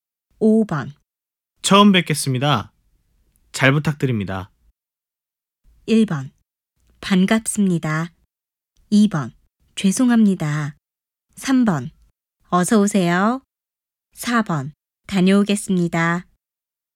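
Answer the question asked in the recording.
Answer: 1: 반갑습니다.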